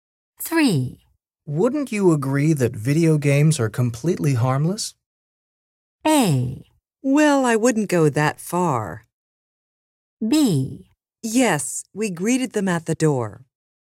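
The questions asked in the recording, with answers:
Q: Wouldn't you agree that video games are completely harmless?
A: A: Well, I wouldn't go that far.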